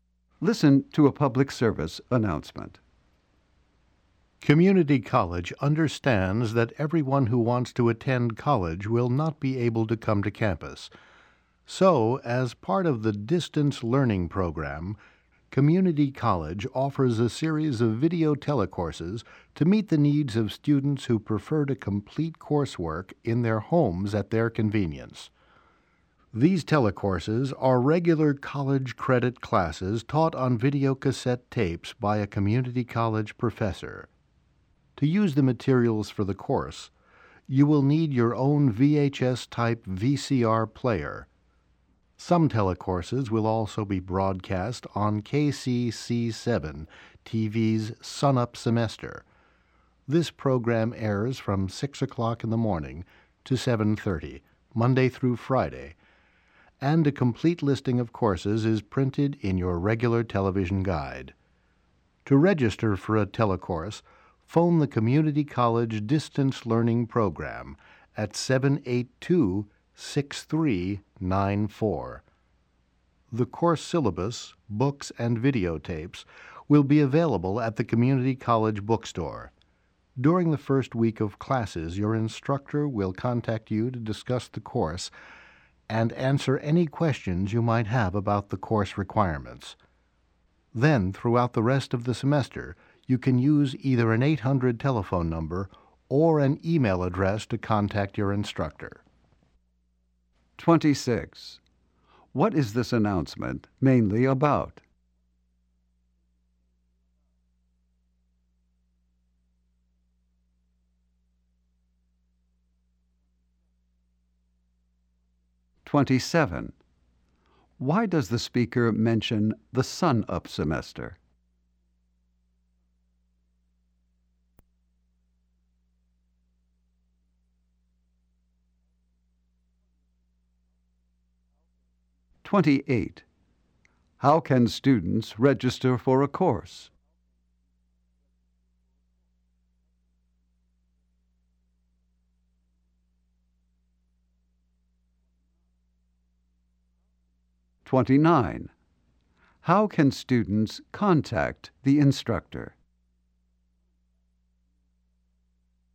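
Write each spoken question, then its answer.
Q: What is this announcement mainly about?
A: Community College's video telecourses for distance learning.

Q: Why does the speaker mention the Sunup Semester?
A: Some telecourses are broadcast on it.

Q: How can students register for a course?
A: By phoning the Distance Learning Program at 782-6394.

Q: How can students contact the instructor?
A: By an 800 telephone number or email.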